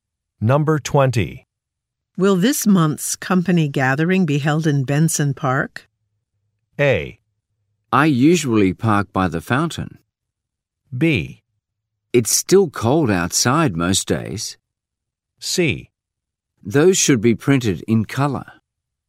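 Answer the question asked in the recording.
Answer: B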